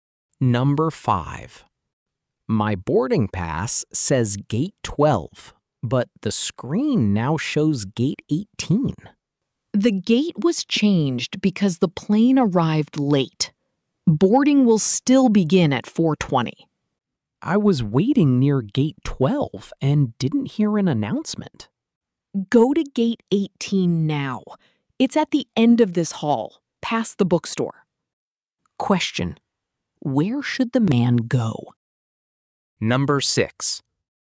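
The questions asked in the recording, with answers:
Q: where should the man go?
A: To gate 18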